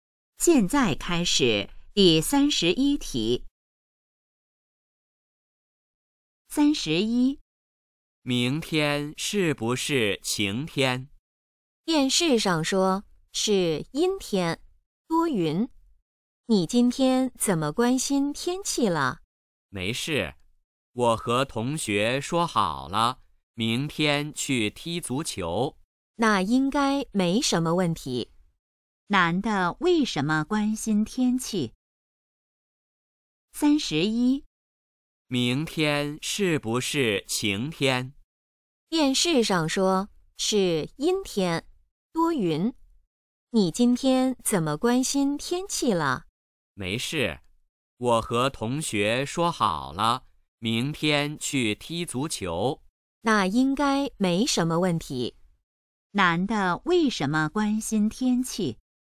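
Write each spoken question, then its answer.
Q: 男的为什么关心天气?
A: 明天要去踢足球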